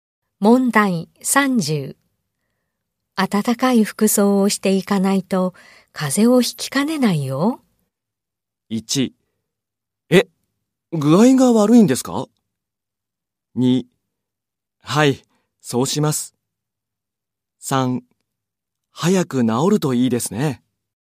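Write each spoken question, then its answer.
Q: 暖かい服装をしていかないと風邪をひきかねないよ。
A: 2: はい、そうします。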